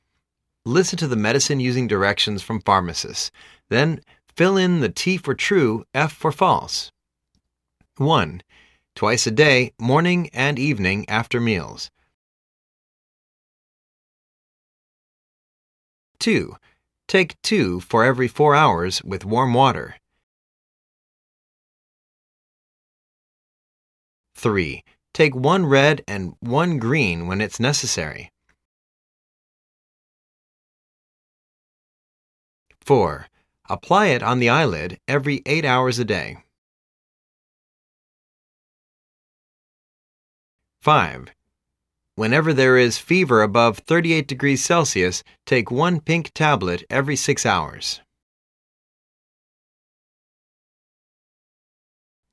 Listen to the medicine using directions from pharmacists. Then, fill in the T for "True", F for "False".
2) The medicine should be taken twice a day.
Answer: F

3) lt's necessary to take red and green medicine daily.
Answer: F